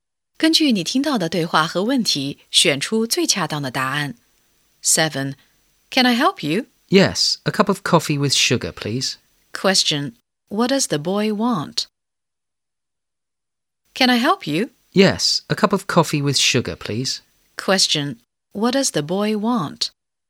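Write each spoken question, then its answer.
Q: Question, what does the boy want?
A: A cup of coffee with sugar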